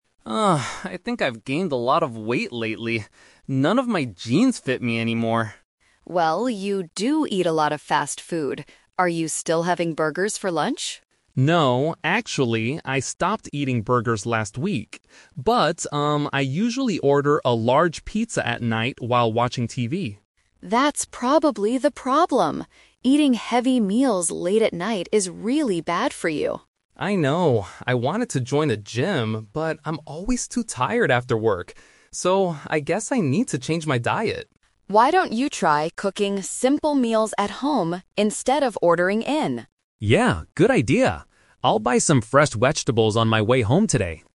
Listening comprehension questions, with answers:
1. What is Mark's main problem?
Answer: He is putting on weight.

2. What does Mark currently do that is unhealthy?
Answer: He eats pizza late in the evening.

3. What did Mark originally plan to do to get healthy?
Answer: Go to the gym.

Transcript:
Mark: Ugh, I think I've gained a lot of weight lately. None of my jeans fit me anymore.
Sarah: Well, you do eat a lot of fast food. Are you still having burgers for lunch?
Mark: No, actually, I stopped eating burgers last week. I usually order a large pizza at night while watching TV.
Sarah: That's probably the problem! Eating heavy meals late at night is really bad for you.
Mark: I know. I wanted to join a gym, but I'm always too tired after work. So, I guess I need to change my diet.
Sarah: Why don't you try cooking simple meals at home instead of ordering in?